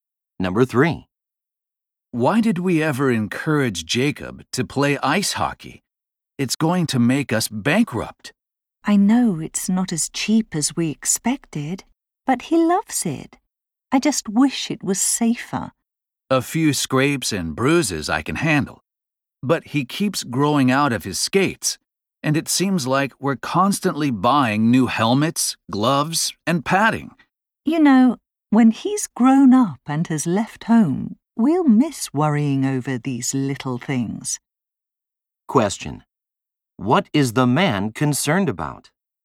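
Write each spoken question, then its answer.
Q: What is the man concerned about?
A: The high cost of Jacob's ice hockey equipment.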